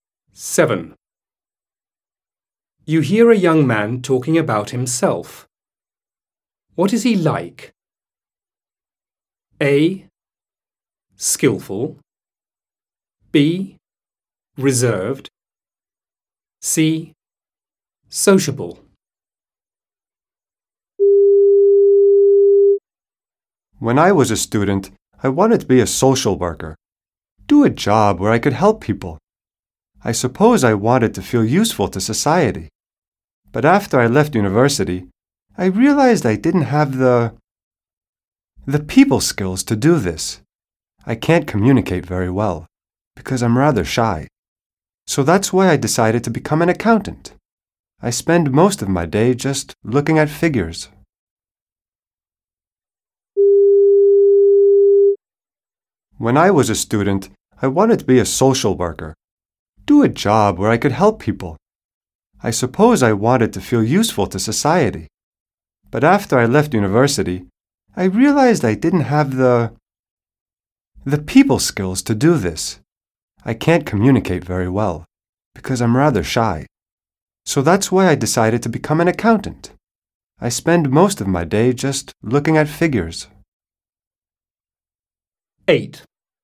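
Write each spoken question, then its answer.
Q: What is he like?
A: B: Reserved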